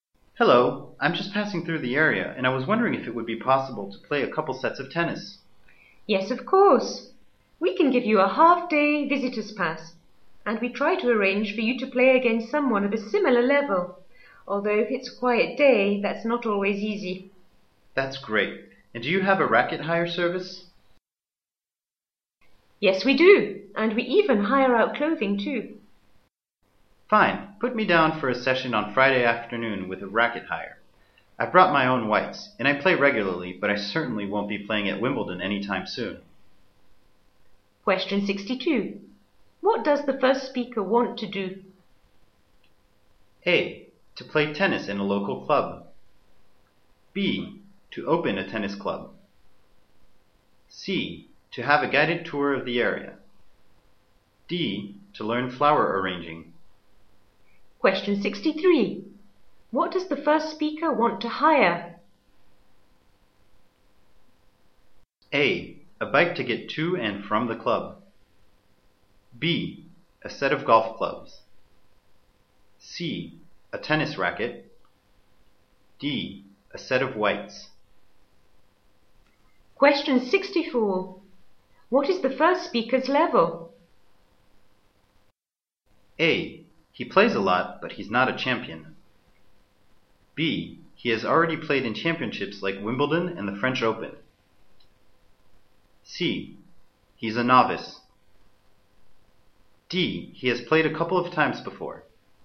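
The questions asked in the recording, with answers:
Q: What does the first speaker want to do?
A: A: To play tennis in a local club.

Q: What does the first speaker want to hire?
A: C: A tennis racket.

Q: What is the first speaker's level?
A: A: He plays a lot, but he's not a champion.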